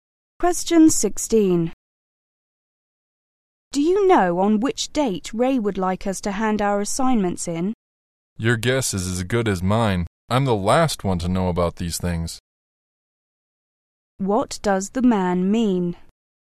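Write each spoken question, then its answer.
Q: What does the man mean?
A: He doesn't know the date either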